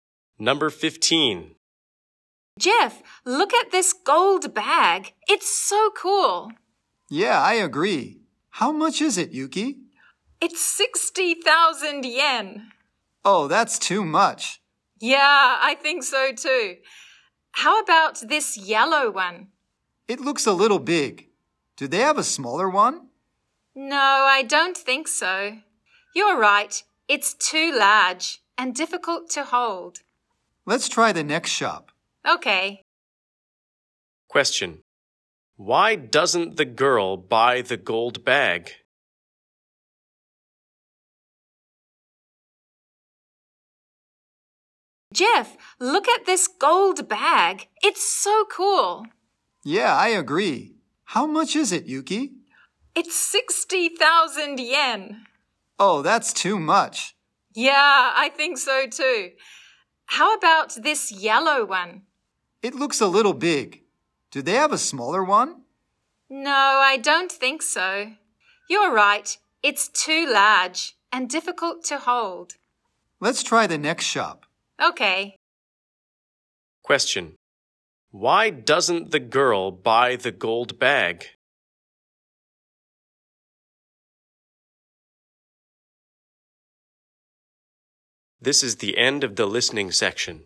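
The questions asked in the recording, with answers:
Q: Why doesn't the girl buy the gold bag?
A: It's too expensive (60,000 yen).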